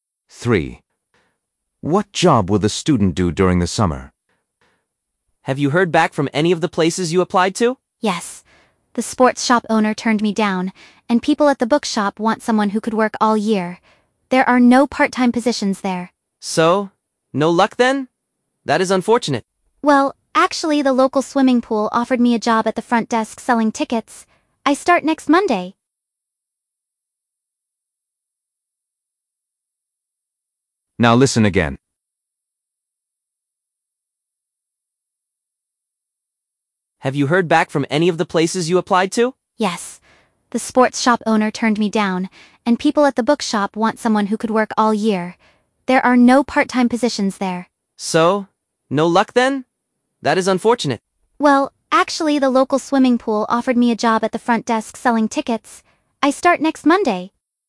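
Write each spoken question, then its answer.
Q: What job will the student do during the summer?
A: selling tickets at the swimming pool front desk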